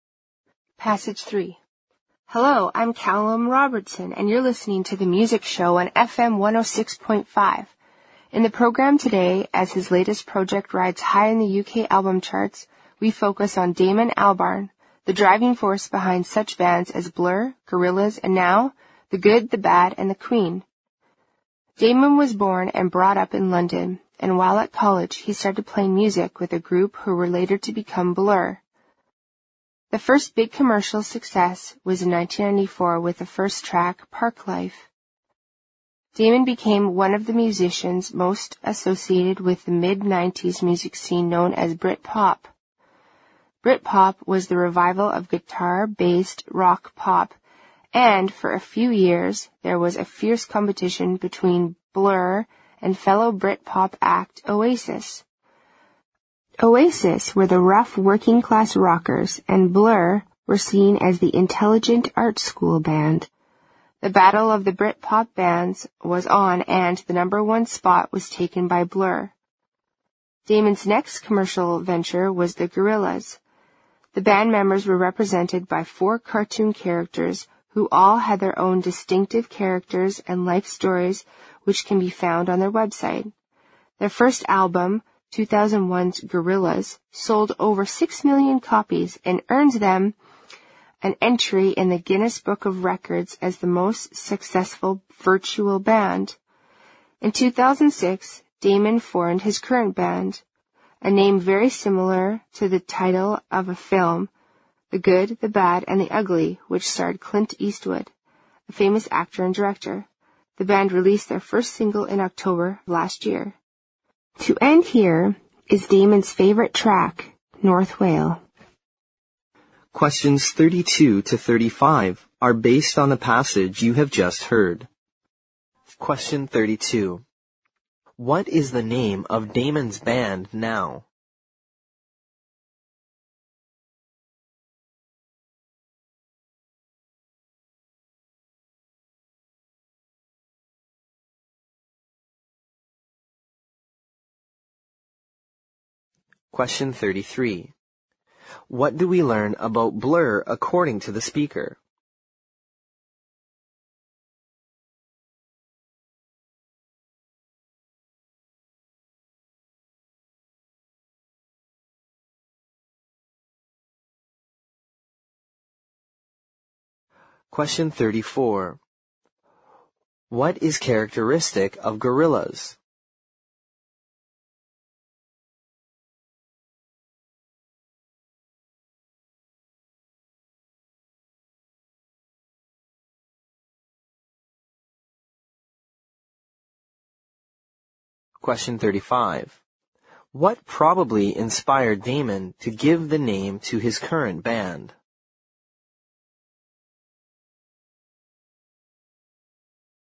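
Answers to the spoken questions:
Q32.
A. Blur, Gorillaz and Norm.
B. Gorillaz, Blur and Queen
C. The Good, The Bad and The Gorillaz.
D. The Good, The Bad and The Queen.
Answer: D. The Good, The Bad and The Queen.
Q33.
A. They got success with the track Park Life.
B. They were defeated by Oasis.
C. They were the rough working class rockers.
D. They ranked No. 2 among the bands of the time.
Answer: A. They got success with the track Park Life.
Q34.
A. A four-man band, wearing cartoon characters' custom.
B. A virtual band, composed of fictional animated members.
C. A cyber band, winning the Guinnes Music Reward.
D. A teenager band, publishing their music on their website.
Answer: B. A virtual band, composed of fictional animated members.
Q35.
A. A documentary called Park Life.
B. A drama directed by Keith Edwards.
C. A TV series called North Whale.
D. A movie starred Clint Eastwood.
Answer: D. 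A movie starred Clint Eastwood.

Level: 六级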